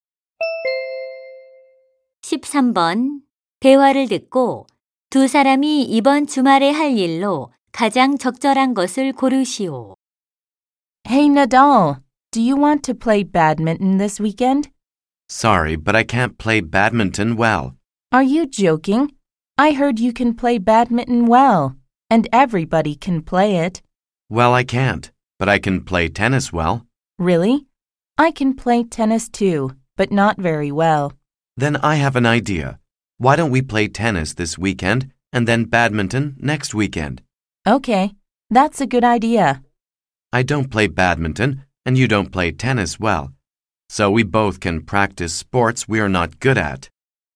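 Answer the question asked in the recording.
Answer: 테니스 치기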